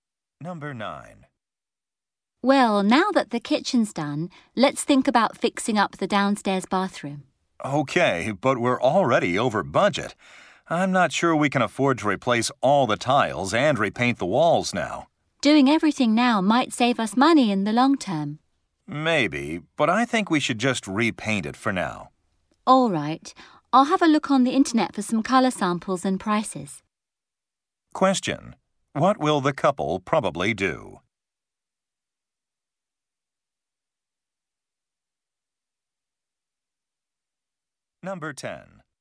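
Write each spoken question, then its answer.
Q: What will the couple probably do?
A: Only repaint the downstairs bathroom for now.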